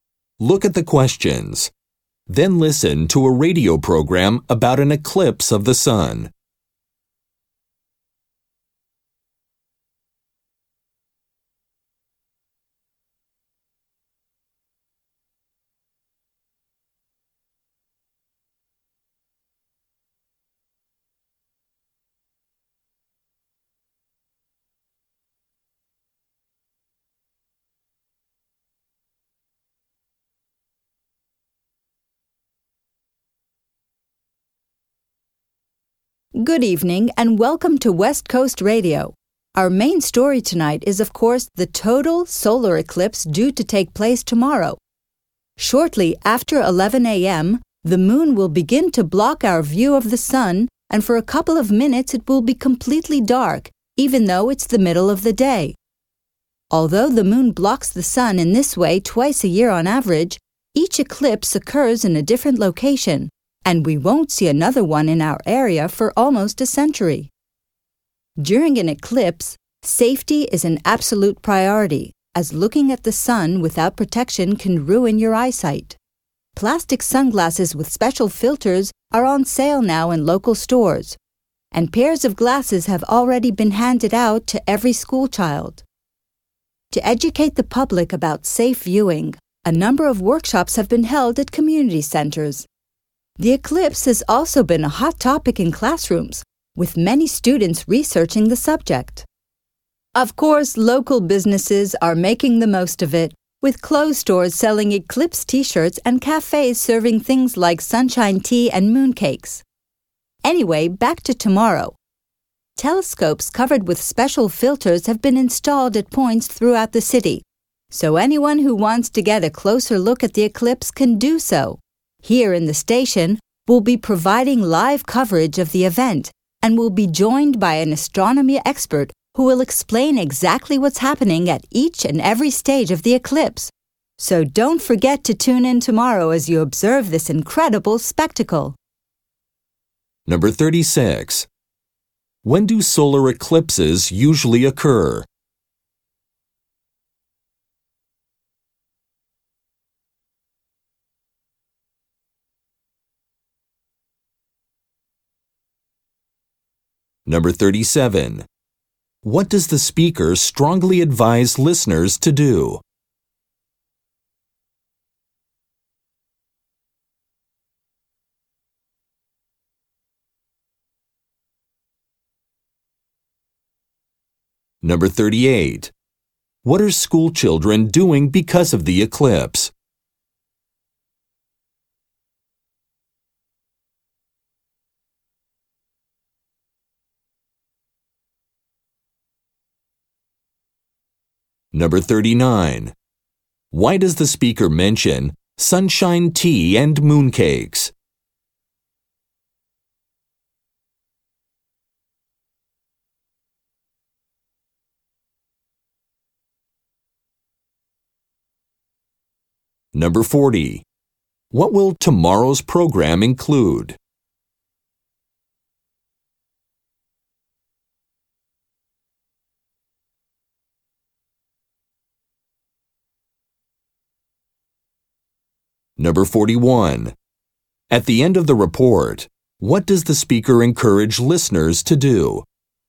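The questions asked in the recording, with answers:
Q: When do solar eclipses usually occur?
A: About twice a year

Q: What does the speaker strongly advise listeners to do?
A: Protect their eyes and not look at the sun without protection

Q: What are school children doing because of the eclipse?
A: Researching the subject in class

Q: Why does the speaker mention sunshine tea and mooncakes?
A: To show local businesses are profiting from the eclipse

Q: What will tomorrow's program include?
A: Live coverage with an astronomy expert

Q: At the end of the report, what does the speaker encourage listeners to do?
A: Tune in to the program tomorrow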